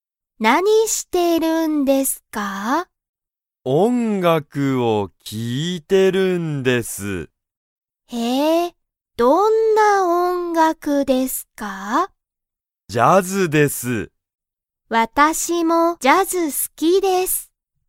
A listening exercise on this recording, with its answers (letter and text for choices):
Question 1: 佐藤(さとう)さんは____を聴(き)いている。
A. 映画(えいが)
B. 音楽(おんがく)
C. ラジオ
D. ドラマ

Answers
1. B. 音楽(おんがく)

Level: Level 1